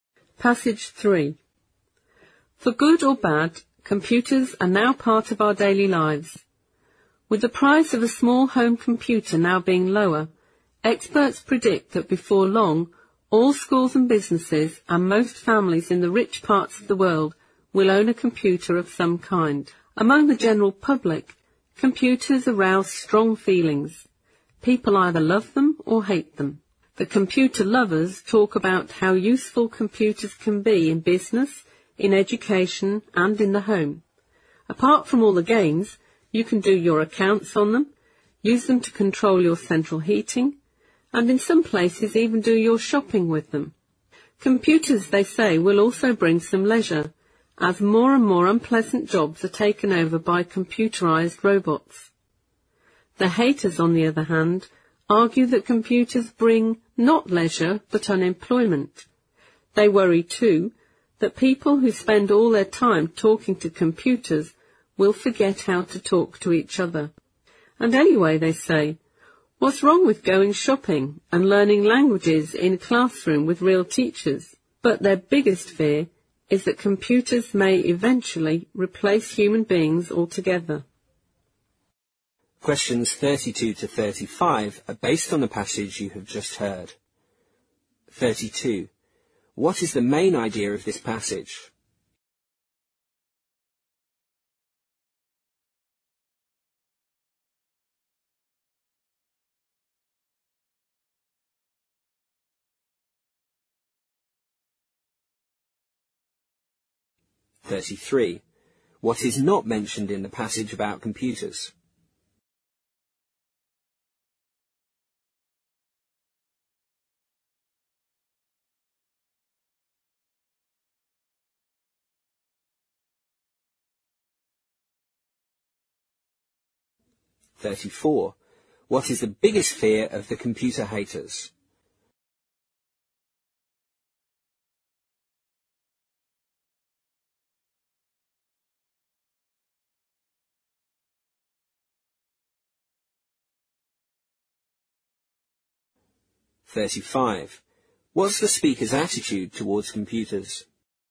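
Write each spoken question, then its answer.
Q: What is the main idea of this passage?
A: People have strong mixed feelings about computers: some love them and some hate them

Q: What is the biggest fear of the computer haters?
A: That computers may eventually replace human beings altogether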